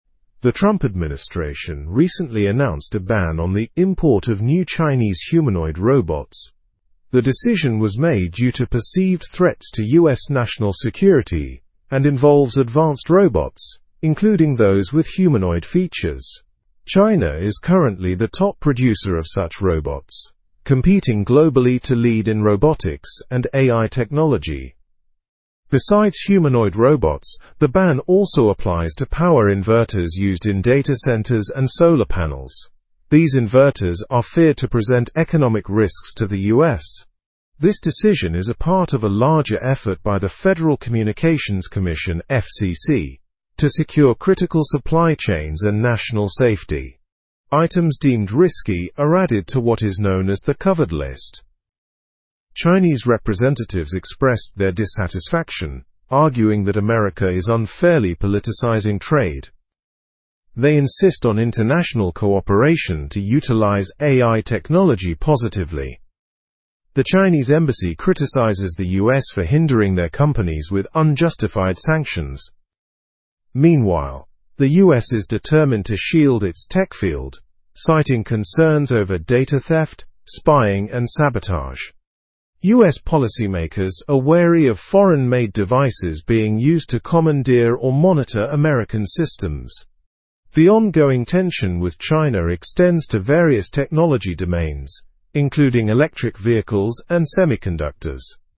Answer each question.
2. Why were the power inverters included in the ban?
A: They were included due to fears of economic risks to the US.

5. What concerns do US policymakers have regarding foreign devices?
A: They are concerned about data theft, spying, and sabotage.

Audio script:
The Trump administration recently announced a ban on the import of new Chinese humanoid robots. The decision was made due to perceived threats to US national security and involves advanced robots, including those with humanoid features. China is currently the top producer of such robots, competing globally to lead in robotics and AI technology.
Besides humanoid robots, the ban also applies to power inverters used in data centers and solar panels. These inverters are feared to present economic risks to the US. This decision is a part of a larger effort by the Federal Communications Commission (FCC) to secure critical supply chains and national safety. Items deemed risky are added to what is known as the Covered List.
Chinese representatives expressed their dissatisfaction, arguing that America is unfairly politicizing trade. They insist on international cooperation to utilize AI technology positively. The Chinese embassy criticizes the US for hindering their companies with unjustified sanctions.
Meanwhile, the US is determined to shield its tech field, citing concerns over data theft, spying, and sabotage. US policymakers are wary of foreign-made devices being used to commandeer or monitor American systems. The ongoing tension with China extends to various technology domains, including electric vehicles and semiconductors.

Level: Level 3